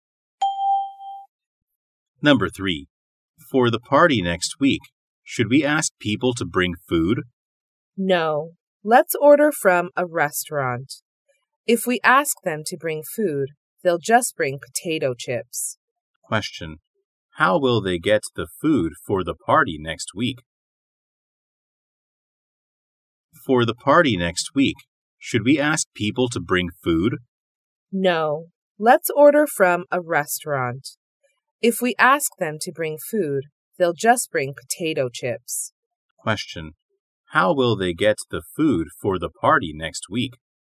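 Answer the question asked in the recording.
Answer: They will order it from a restaurant.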